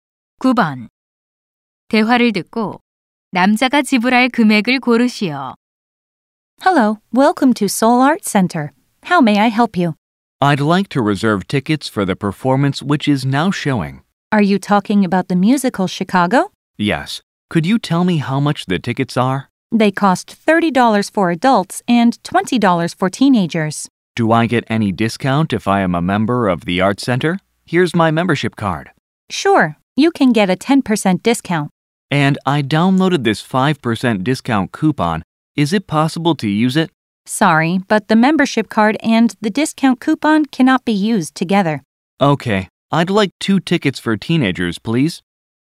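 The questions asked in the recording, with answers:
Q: 대화를 듣고 남자가 지불할 금액을 고르시오.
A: $36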